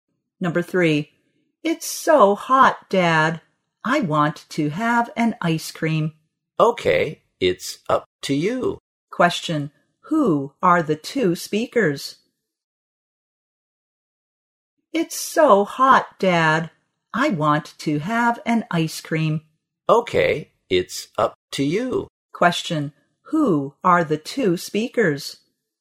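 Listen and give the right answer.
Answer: Father and child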